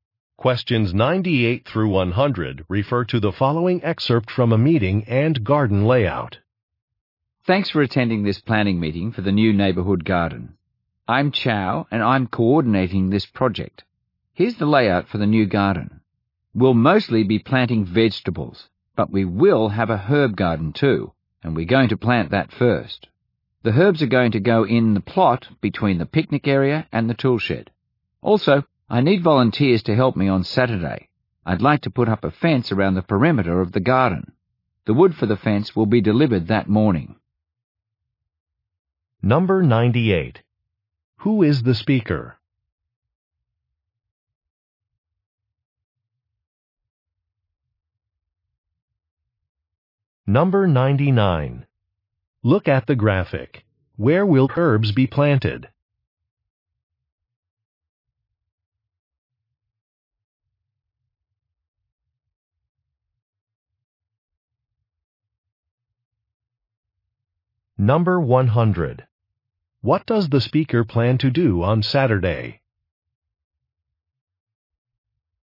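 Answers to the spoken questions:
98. The garden project coordinator
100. Put up a fence around the garden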